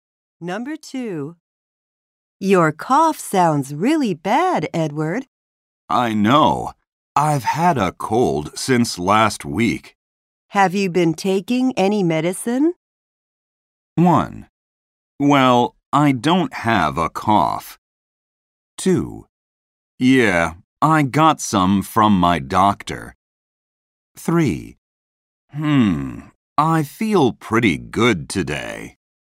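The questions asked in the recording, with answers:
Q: Have you been taking any medicine?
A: 2: Yeah, I got some from my doctor.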